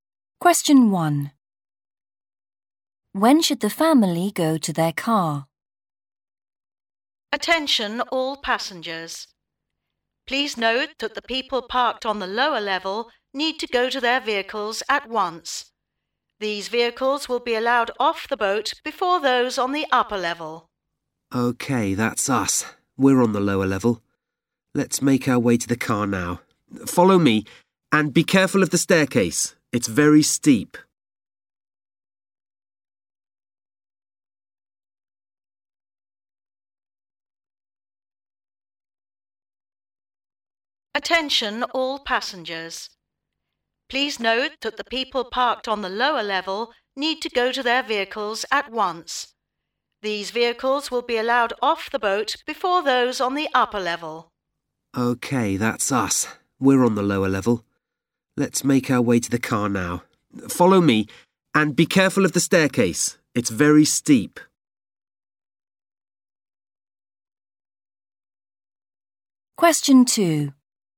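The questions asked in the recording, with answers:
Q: When should the family go to their car?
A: At once (now)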